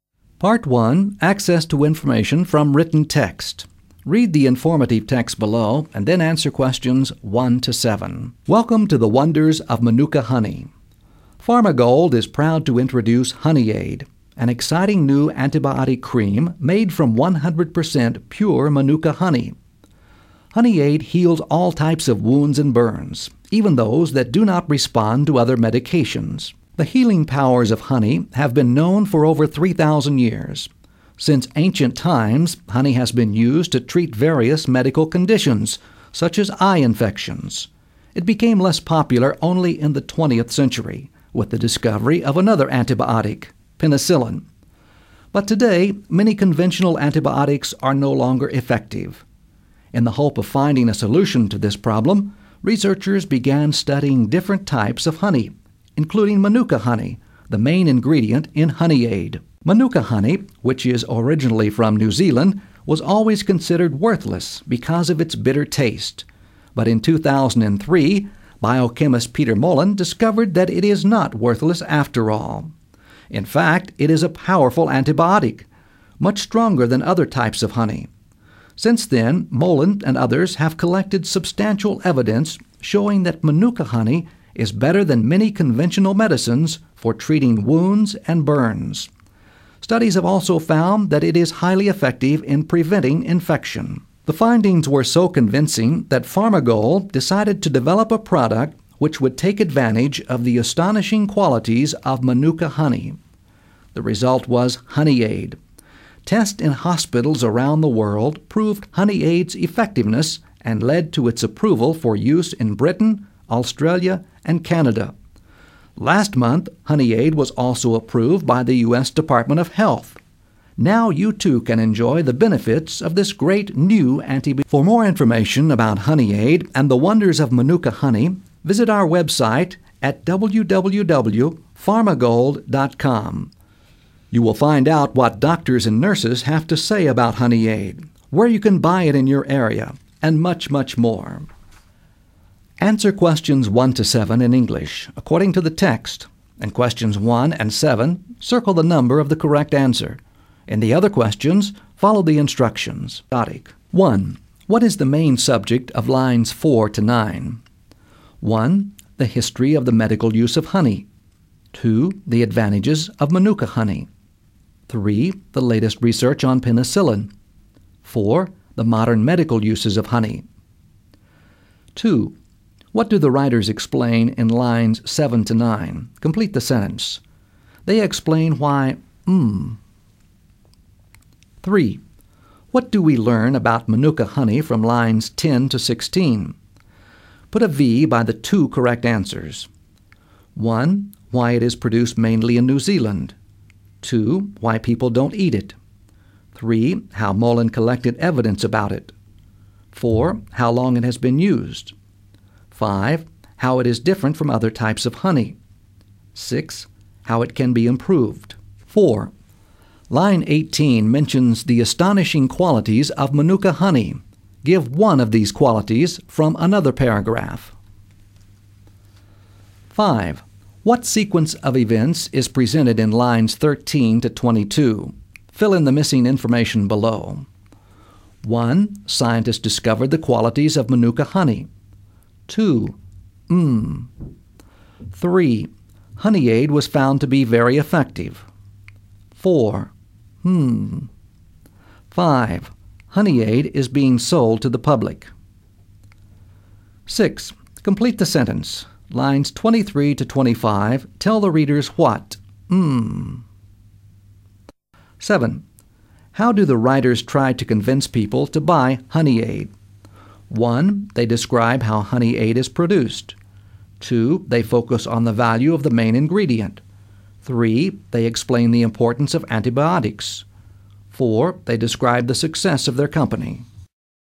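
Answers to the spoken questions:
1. 1: The history of the medical use of honey.
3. 2: Why people don't eat it; 5: How it is different from other types of honey.
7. 2: They focus on the value of the main ingredient.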